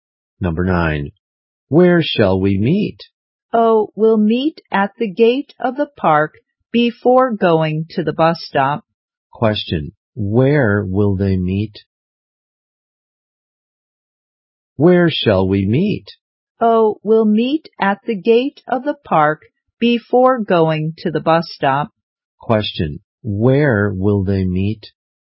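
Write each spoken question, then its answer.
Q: Question. Where will they meet?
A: At the gate of the park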